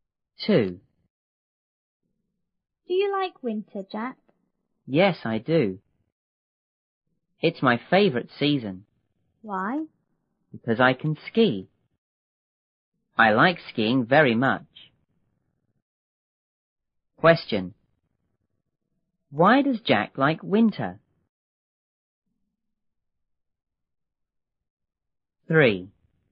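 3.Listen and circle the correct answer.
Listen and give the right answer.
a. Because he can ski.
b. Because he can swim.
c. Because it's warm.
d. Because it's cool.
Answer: a. Because he can ski.

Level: 六年级下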